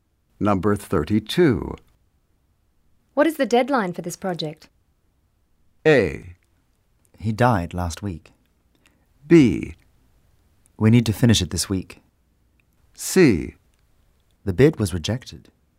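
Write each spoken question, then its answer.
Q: What is the deadline for this project?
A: B: We need to finish it this week.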